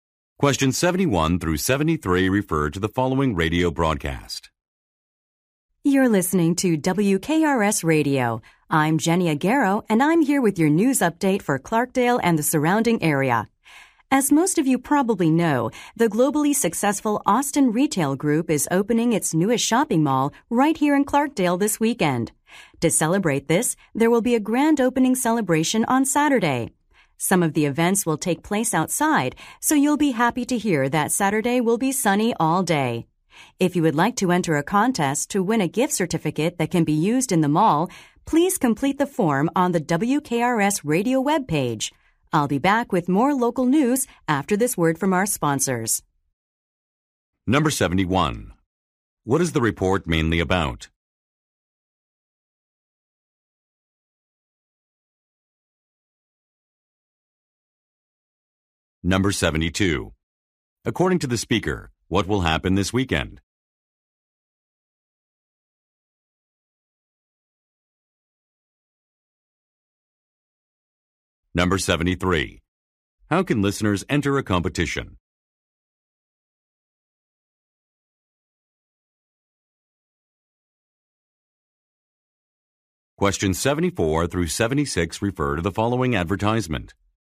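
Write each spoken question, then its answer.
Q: What is the report mainly about?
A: The opening of a new shopping mall in Clarkdale

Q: According to the speaker, what will happen this weekend?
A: A grand opening celebration for the mall

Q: How can listeners enter a competition?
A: By completing a form on the WKRS radio webpage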